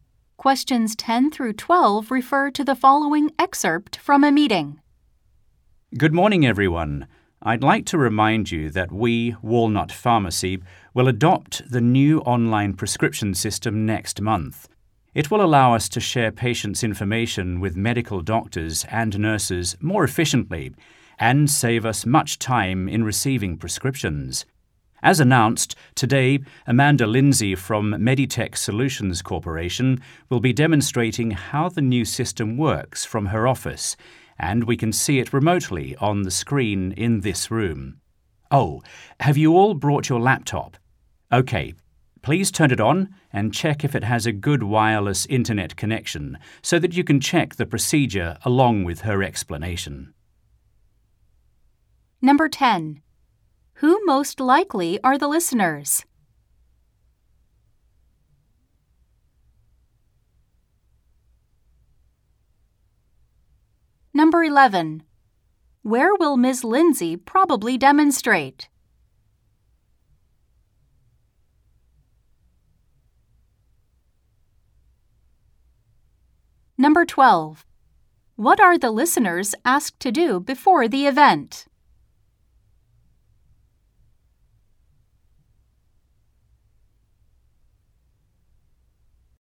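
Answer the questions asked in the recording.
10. Pharmacy staff at Walnut Pharmacy
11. From her office (remotely)
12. Turn on their laptops and check the wireless internet connection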